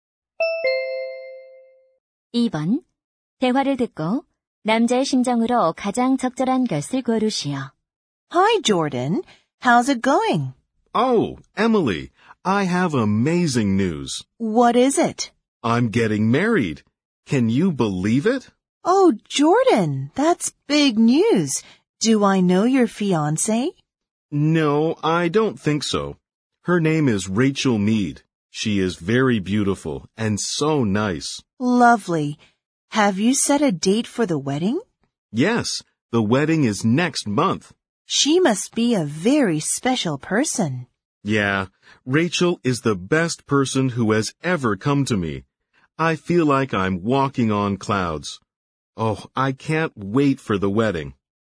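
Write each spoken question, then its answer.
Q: 대화를 듣고 남자의 심정으로 가장 적절한 것을 고르시오.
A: 행복하고 들뜬 심정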